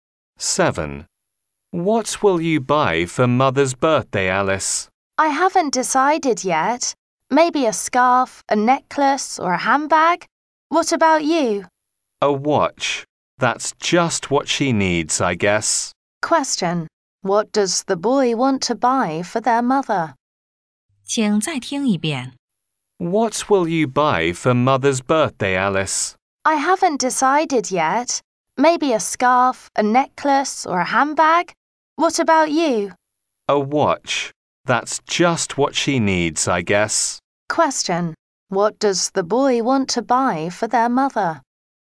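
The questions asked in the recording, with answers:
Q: What does the boy want to buy for their mother?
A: A watch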